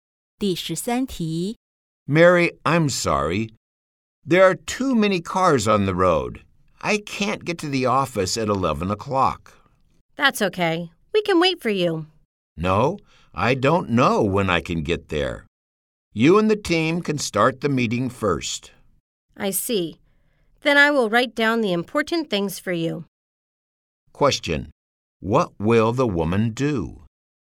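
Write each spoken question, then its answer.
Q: What will the woman do?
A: She will write down the important things from the meeting for the man.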